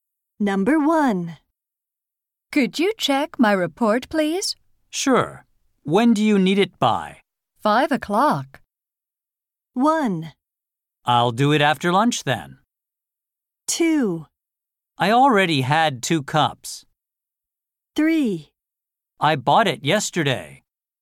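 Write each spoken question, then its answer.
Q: 5 o'clock.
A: 1: I'll do it after lunch then.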